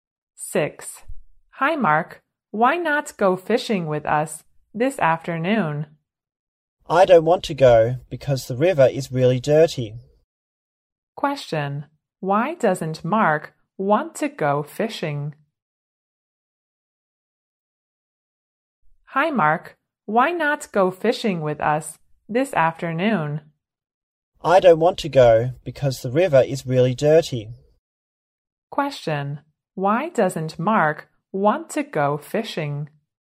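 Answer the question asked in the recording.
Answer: Because the river is really dirty.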